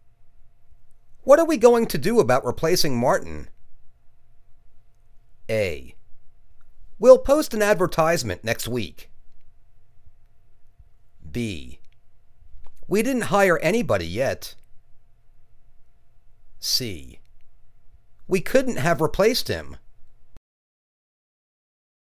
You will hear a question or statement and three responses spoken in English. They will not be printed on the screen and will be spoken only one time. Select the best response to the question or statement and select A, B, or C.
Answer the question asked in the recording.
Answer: We'll post an advertisement next week.